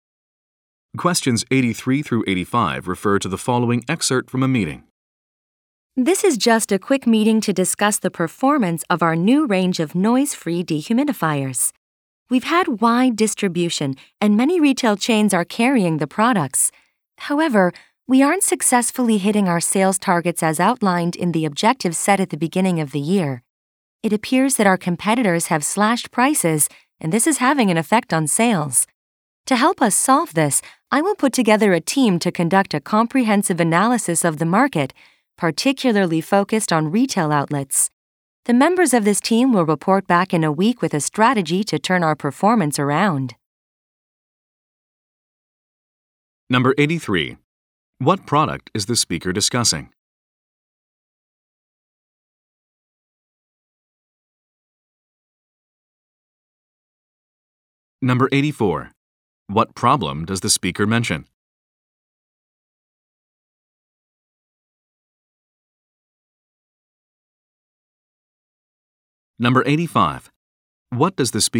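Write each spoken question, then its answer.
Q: What product is the speaker discussing?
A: Noise-free dehumidifiers

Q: What problem does the speaker mention?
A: Sales targets are not being met because competitors cut prices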